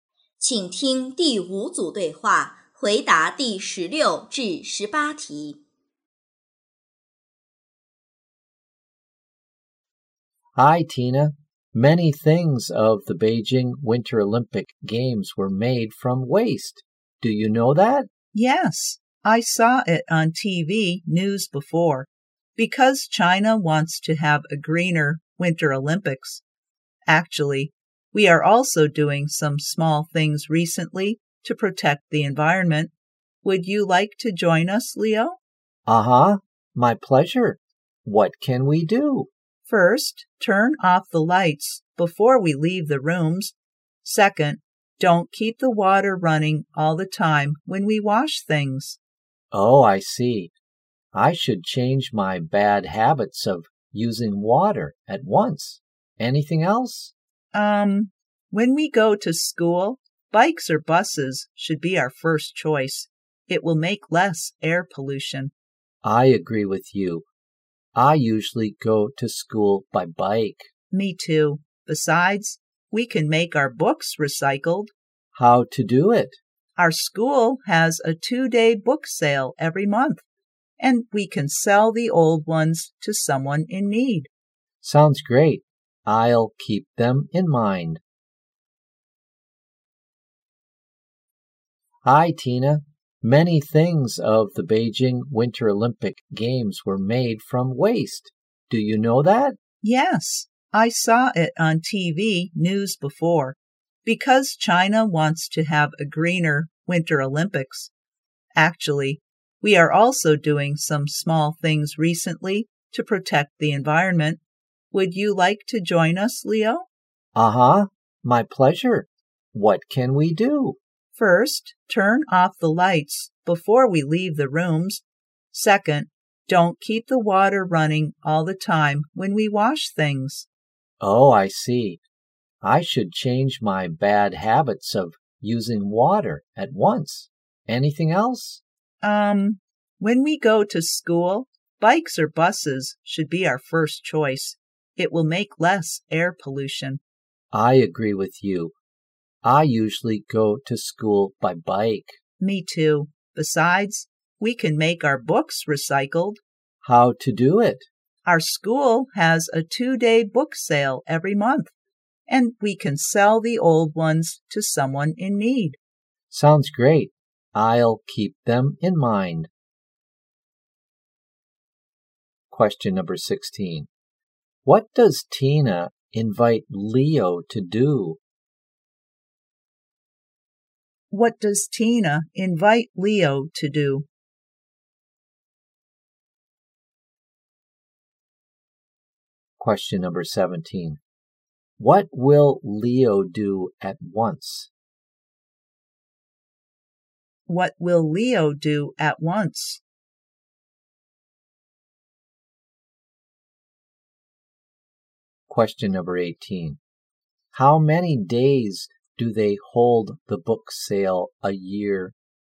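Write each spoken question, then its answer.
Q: What does Tina invite Leo to do?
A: To join them in protecting the environment.

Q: What will Leo do at once?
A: Change his bad habits of using water.

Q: How many days do they hold the book sale a year?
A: 24 days.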